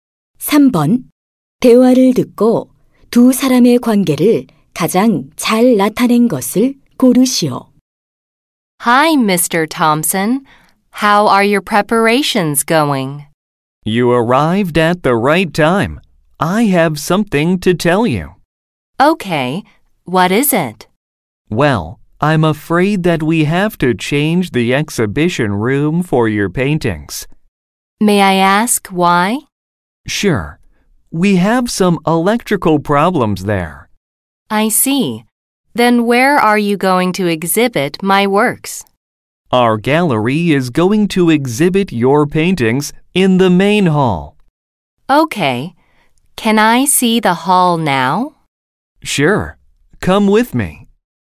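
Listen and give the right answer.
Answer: 화가와 미술관 직원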